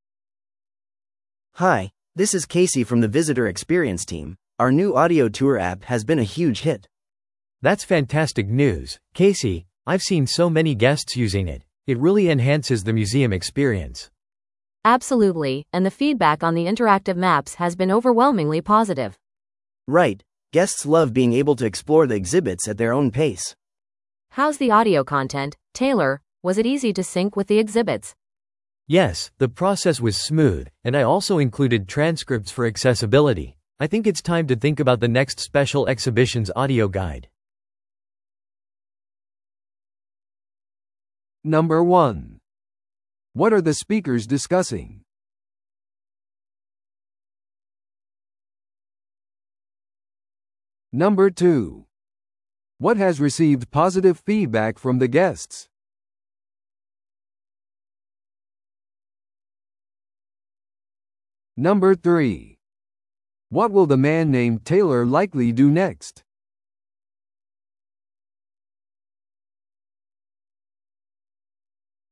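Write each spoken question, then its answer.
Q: What are the speakers discussing?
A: The museum's new audio tour app

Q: What has received positive feedback from the guests?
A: The interactive maps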